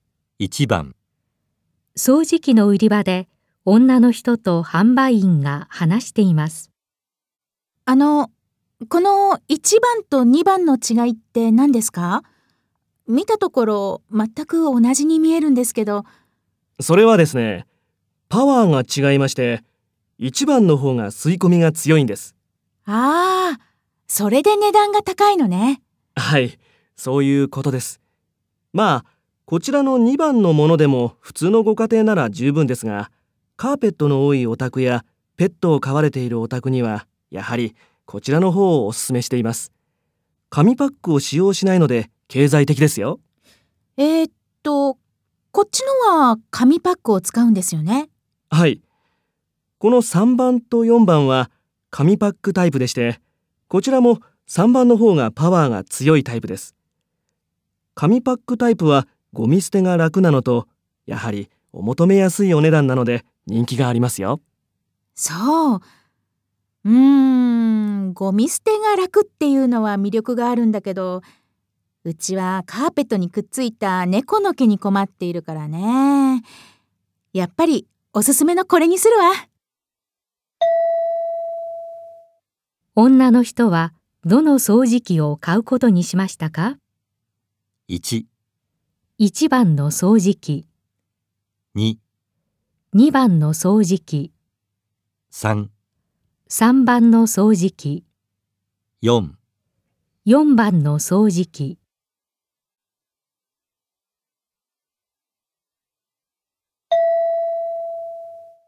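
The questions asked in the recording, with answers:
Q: 女の人はどの掃除機を買うことにしましたか?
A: 1: 1番の掃除機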